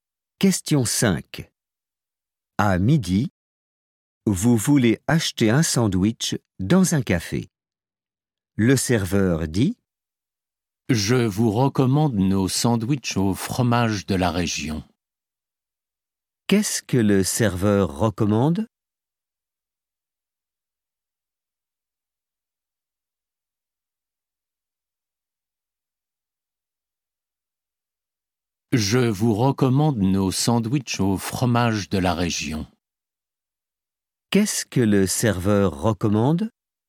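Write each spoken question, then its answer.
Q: Qu'est-ce que le serveur recommande ?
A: Les sandwichs au fromage de la région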